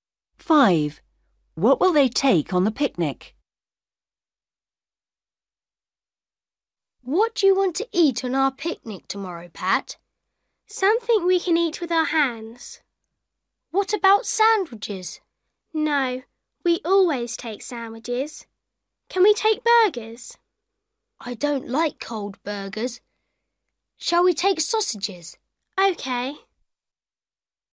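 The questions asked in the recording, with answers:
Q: What will they take on the picnic?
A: Sausages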